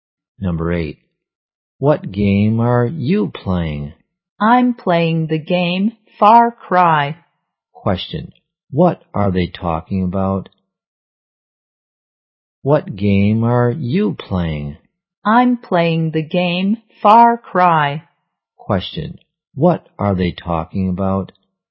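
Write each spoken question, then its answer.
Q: What are they talking about?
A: A game (Far Cry)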